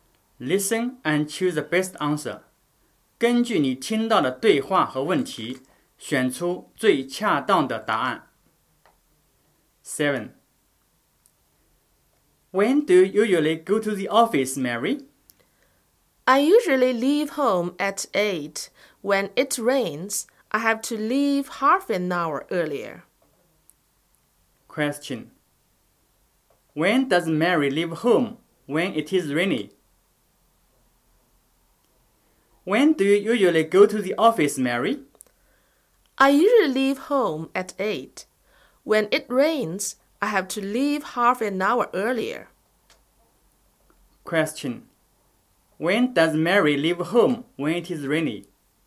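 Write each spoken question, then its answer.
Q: When does Mary leave home when it is rainy?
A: At 7:30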